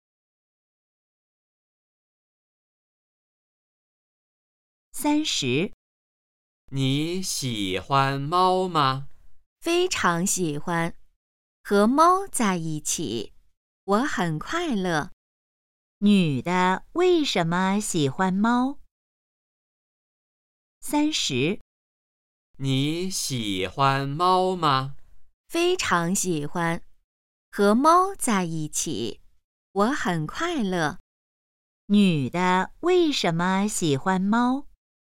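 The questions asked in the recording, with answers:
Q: 女的为什么喜欢猫?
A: 和猫在一起很快乐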